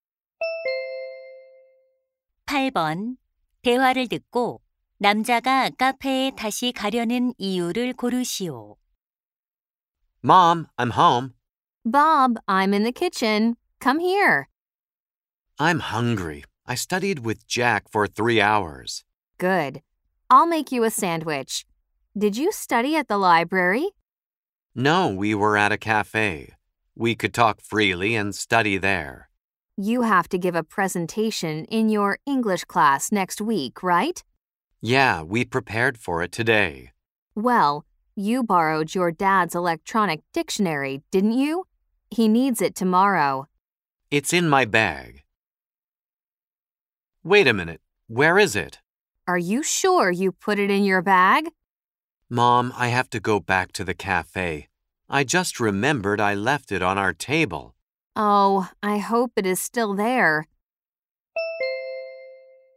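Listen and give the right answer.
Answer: 아빠의 전자사전을 카페 테이블에 두고 와서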